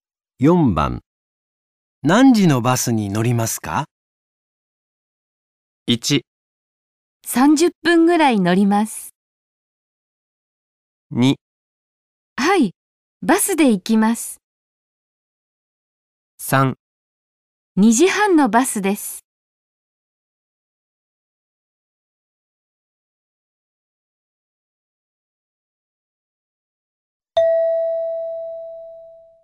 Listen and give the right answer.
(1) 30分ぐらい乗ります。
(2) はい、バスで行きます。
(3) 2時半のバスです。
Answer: (3) 2時半のバスです。

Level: N5 Listening · Test 3